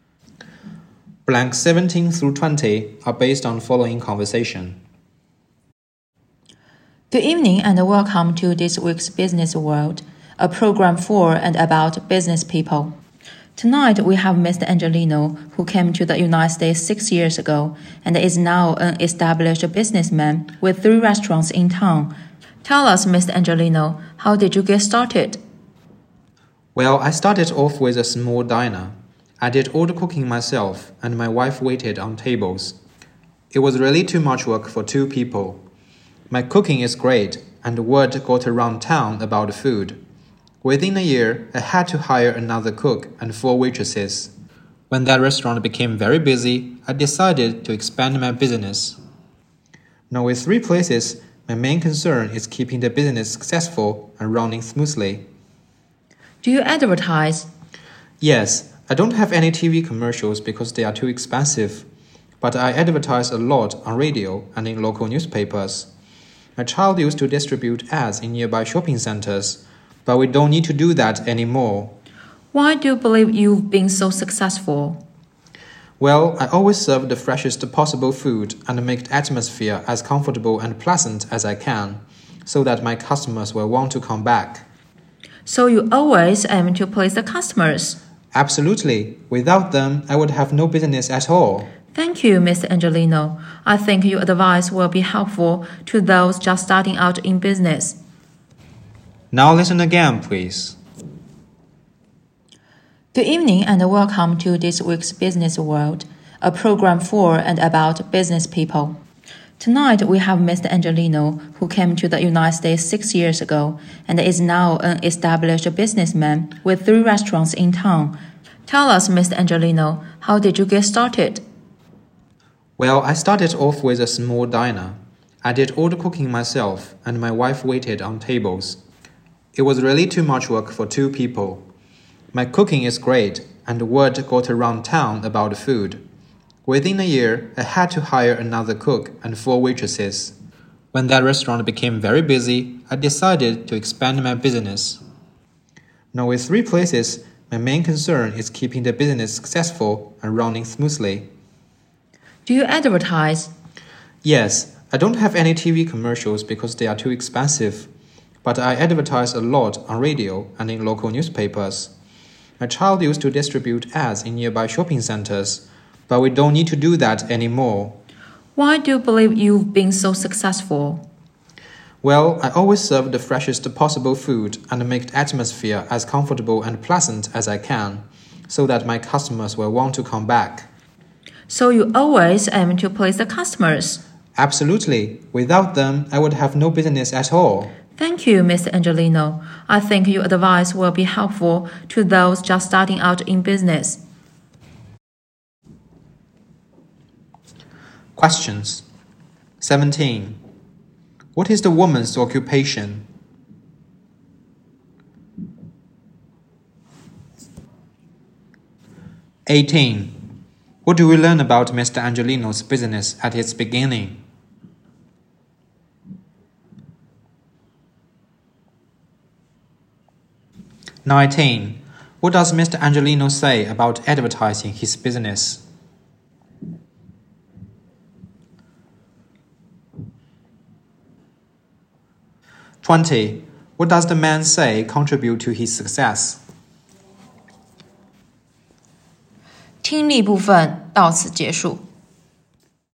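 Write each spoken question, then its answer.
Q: What is the woman's occupation?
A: A program host

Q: What do we learn about Mr.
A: He started with a small diner, cooking himself while his wife waited on tables

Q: What does Mr. Angelino say about advertising his business?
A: He advertises on radio and in local newspapers, not on TV

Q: What does the man say contribute to his success?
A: Fresh food and a comfortable, pleasant atmosphere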